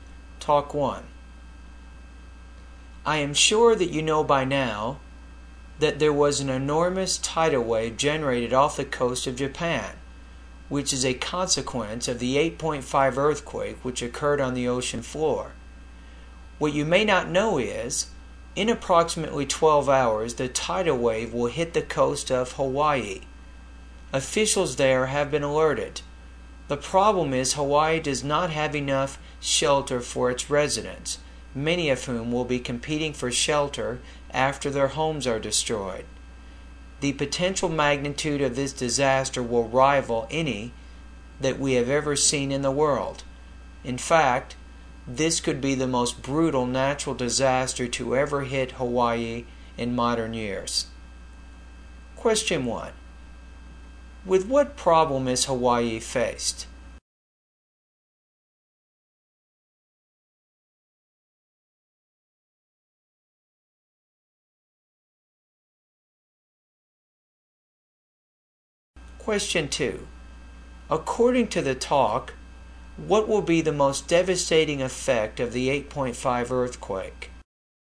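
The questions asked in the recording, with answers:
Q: With what problem is Hawaii faced?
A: It does not have enough shelter for its residents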